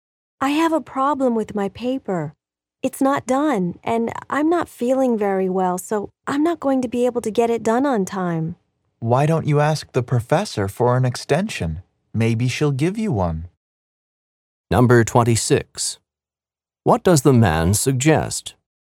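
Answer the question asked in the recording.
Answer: Asking the professor for an extension.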